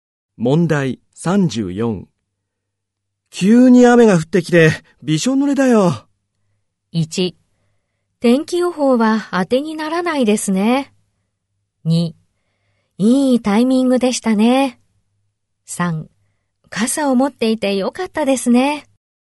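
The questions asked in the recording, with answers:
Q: 急に雨が降ってきて、びしょ濡れだよ。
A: 1: 天気予報は当てにならないですね。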